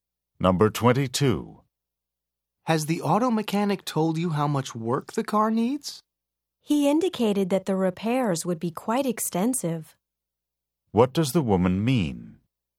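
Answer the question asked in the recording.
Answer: The car needs a lot of repairs.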